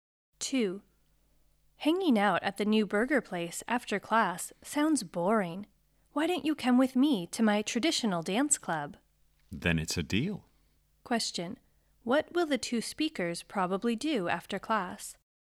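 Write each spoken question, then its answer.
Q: What will the two speakers probably do after class?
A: Go to the traditional dance club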